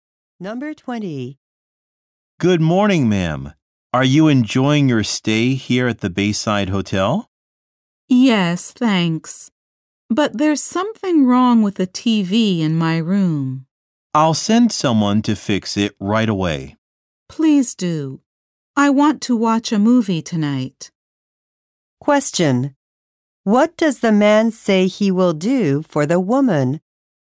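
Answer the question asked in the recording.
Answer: Send someone to fix the TV in her room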